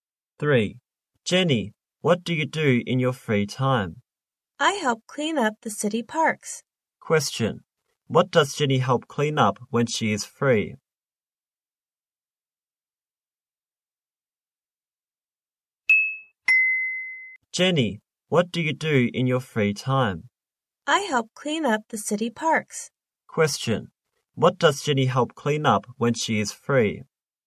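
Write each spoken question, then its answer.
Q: What does Jenny help clean up when she is free?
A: The city parks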